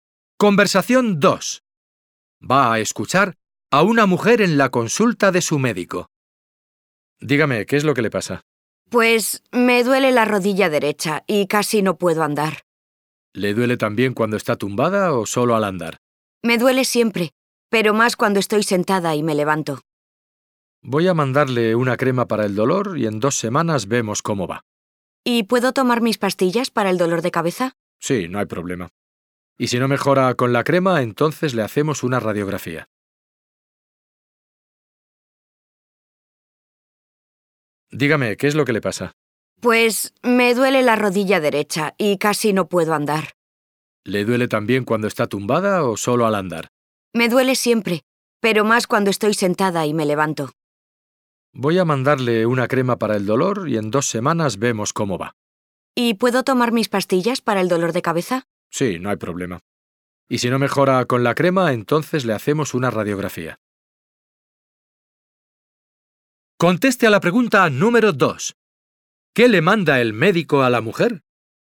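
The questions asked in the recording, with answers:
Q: ¿Qué le manda el médico a la mujer?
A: Una crema para el dolor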